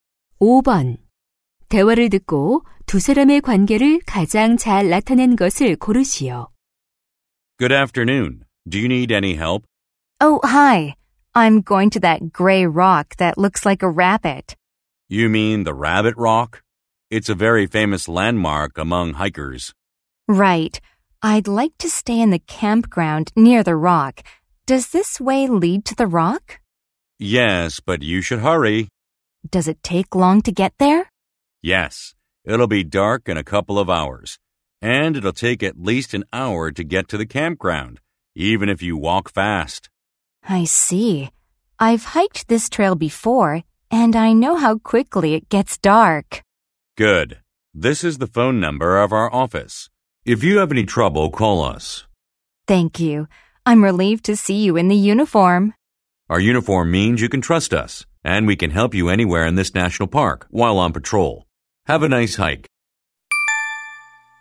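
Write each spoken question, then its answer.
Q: 대화를 듣고 두 사람의 관계를 가장 잘 나타낸 것을 고르시오.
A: 등산객 - 국립공원 순찰대원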